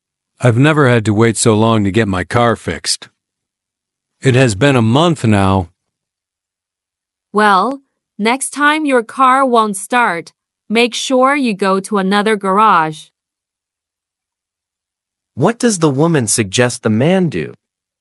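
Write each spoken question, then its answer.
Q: What does the woman suggest the man do?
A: Go to another garage next time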